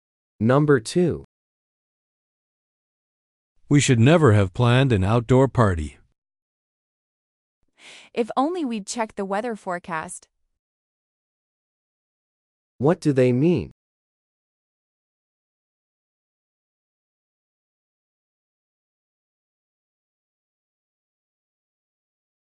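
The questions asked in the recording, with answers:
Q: What do they mean?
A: They regret planning an outdoor party without checking the weather forecast.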